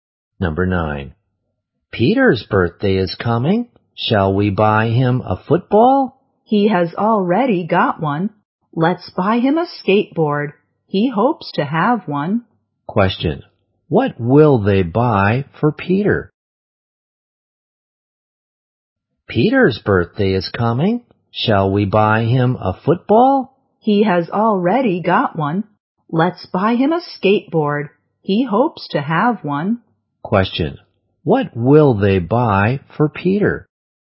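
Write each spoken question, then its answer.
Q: What will they buy for Peter?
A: A skateboard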